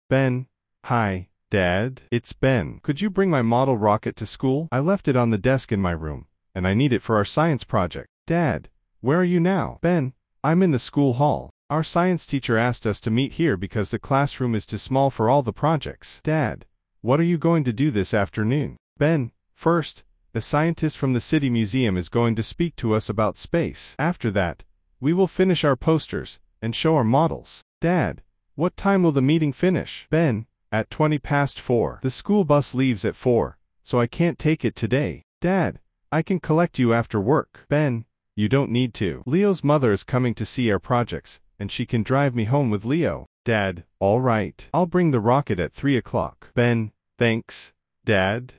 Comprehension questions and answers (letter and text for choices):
Ты услышишь диалог. Для каждого предложения А–Е выбери один правильный вариант ответа из трёх предложенных: 1, 2 или 3. Ты услышишь текст дважды.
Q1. Why is Ben calling his father?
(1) He needs help with a school project.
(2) He wants permission to go to the museum.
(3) He has forgotten something at home.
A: (3) He has forgotten something at home.

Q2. Where is Ben now?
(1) In the school library.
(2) In the art room.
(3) In the school hall.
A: (3) In the school hall.

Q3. Why will Ben not take the school bus home?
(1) The bus is not running today.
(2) The meeting will finish too late.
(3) His bus ticket is at home.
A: (2) The meeting will finish too late.

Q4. How will Ben probably get home?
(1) His father will collect him.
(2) He will walk home with Leo.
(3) Leo's mother will drive him.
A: (3) Leo's mother will drive him.

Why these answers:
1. Ben звонит, потому что оставил дома модель ракеты.
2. Во время разговора он находится в школьном актовом зале.
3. Встреча заканчивается в 4:20, а школьный автобус отправляется в 4:00.
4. Домой Ben отвезёт мама Leo.

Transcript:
Ben: Hi, Dad. It's Ben. Could you bring my model rocket to school? I left it on the desk in my room, and I need it for our science project.
Dad: Where are you now?
Ben: I'm in the school hall. Our science teacher asked us to meet here because the classroom is too small for all the projects.
Dad: What are you going to do this afternoon?
Ben: First, a scientist from the city museum is going to speak to us about space. After that, we will finish our posters and show our models.
Dad: What time will the meeting finish?
The school bus leaves at four, so I can't take it today.
Dad: I can collect you after work.
Ben: You don't need to. Leo's mother is coming to see our projects, and she can drive me home with Leo.
Dad: All right. I'll bring the rocket at three o'clock.
Ben: Thanks, Dad!

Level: 4 классе